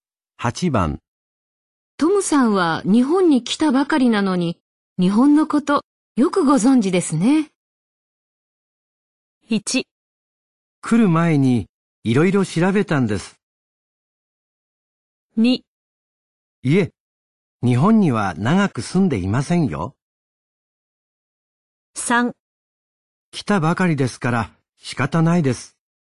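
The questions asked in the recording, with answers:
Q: トムさんは日本に来たばかりなのに、日本のことよくご存知ですね。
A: 1: 来る前にいろいろ調べたんです。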